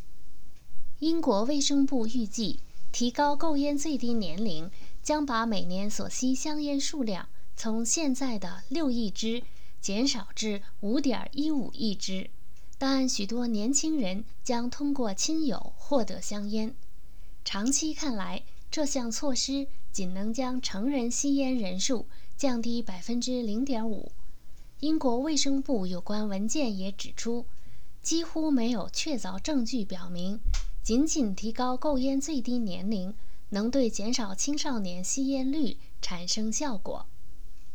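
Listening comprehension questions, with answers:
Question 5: 目前英国香烟年消费量是多少?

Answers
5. 6亿支

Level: 3rd Year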